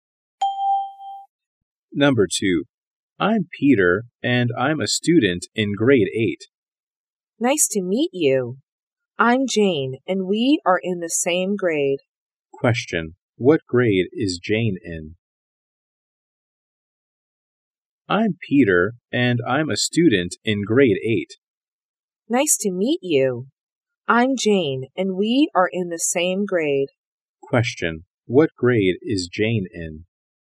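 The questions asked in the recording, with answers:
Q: What grade is Jane in?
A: Grade 8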